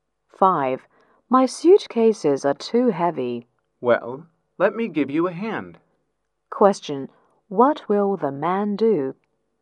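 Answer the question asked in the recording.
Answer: Help carry the suitcases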